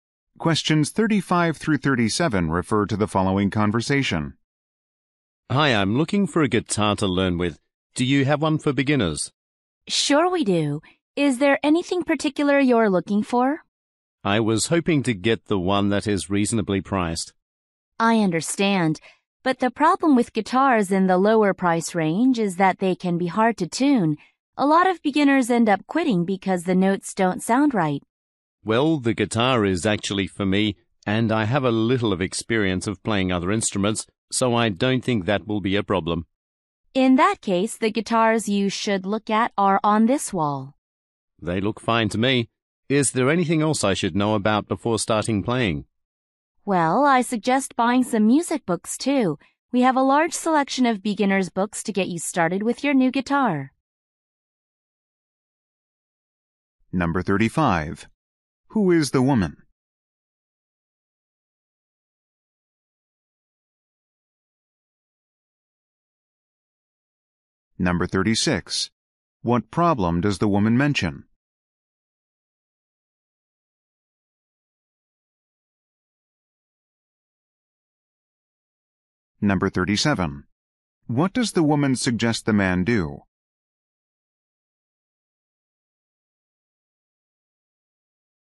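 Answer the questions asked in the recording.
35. A salesperson at a guitar store
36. Cheap guitars can be hard to tune
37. Buy some music books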